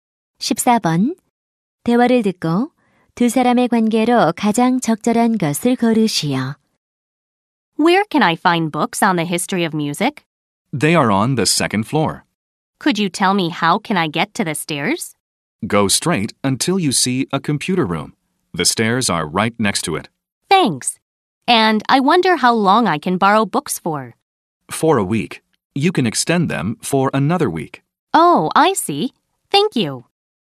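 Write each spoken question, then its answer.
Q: 대화를 듣고 두 사람의 관계로 가장 적절한 것을 고르시오.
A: 도서관 사서와 이용자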